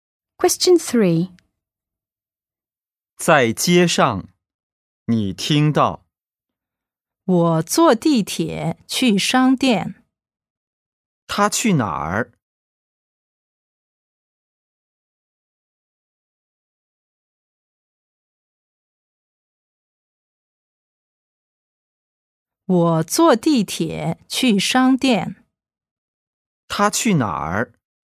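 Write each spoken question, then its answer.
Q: 他去哪儿?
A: 商店(坐地铁去)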